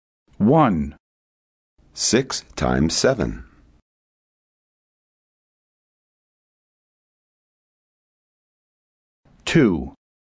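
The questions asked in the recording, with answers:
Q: 6 times 7.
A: 42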